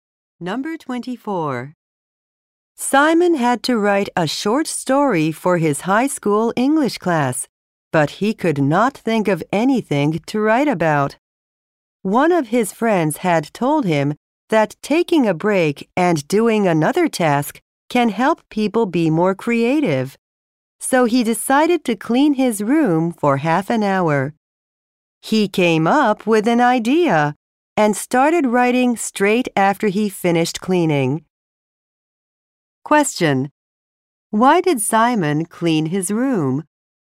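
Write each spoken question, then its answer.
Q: Why did Simon clean his room?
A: To take a break and become more creative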